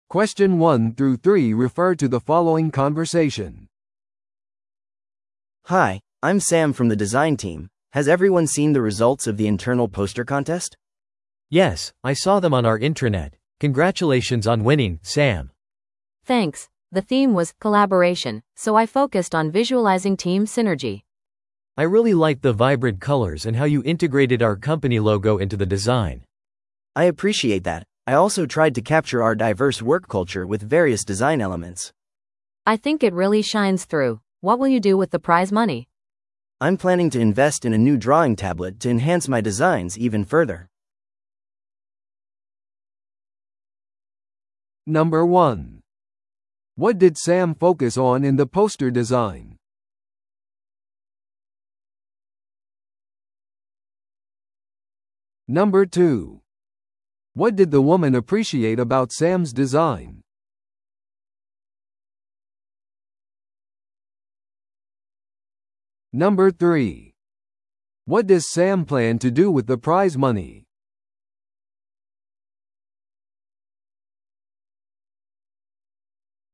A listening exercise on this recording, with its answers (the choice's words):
Listen to the audio below and answer the questions.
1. What did Sam focus on in the poster design?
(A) 会社の将来の目標。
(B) 従業員の好きな色。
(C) コラボレーションのテーマ。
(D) 新商品のマーケティング。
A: コラボレーションのテーマ。

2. What did the woman appreciate about Sam's design?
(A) 抽象的な概念。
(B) 技術の使用。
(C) 色使いとロゴの統合。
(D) 手書きのテキスト。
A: 色使いとロゴの統合。

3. What does Sam plan to do with the prize money?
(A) 寄付する。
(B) 休暇を取る。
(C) 新しい機器を購入する。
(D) チームにギフトを買う。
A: 新しい機器を購入する。

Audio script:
A: Hi, I'm Sam from the design team. Has everyone seen the results of the internal poster contest?
B: Yes, I saw them on our intranet. Congratulations on winning, Sam!
C: Thanks! The theme was 'Collaboration,' so I focused on visualizing team synergy.
B: I really liked the vibrant colors and how you integrated our company logo into the design.
A: I appreciate that. I also tried to capture our diverse work culture with various design elements.
C: I think it really shines through. What will you do with the prize money?
A: I'm planning to invest in a new drawing tablet to enhance my designs even further.